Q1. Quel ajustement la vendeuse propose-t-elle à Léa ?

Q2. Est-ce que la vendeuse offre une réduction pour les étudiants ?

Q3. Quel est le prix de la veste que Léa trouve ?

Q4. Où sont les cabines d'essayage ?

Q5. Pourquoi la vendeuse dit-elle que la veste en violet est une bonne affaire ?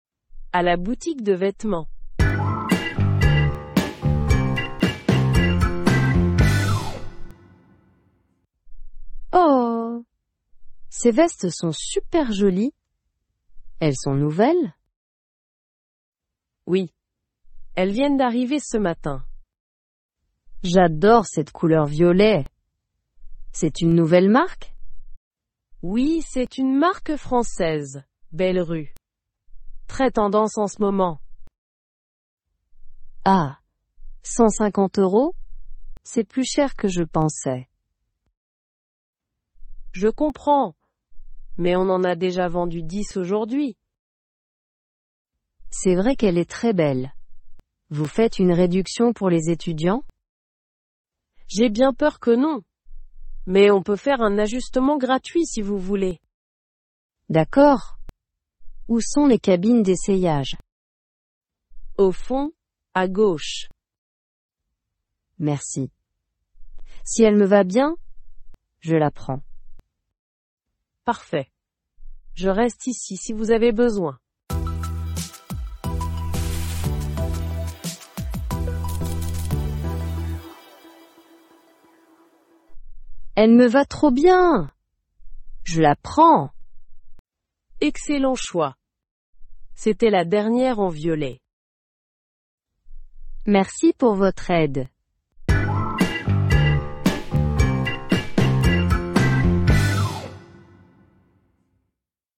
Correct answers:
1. La vendeuse propose de faire un ajustement gratuit.
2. Non, la vendeuse dit qu'il n'y a pas de réduction pour les étudiants.
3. La veste coûte 150 €.
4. Les cabines d'essayage sont au fond, à gauche.
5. Parce que c'était la dernière en violet.

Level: A2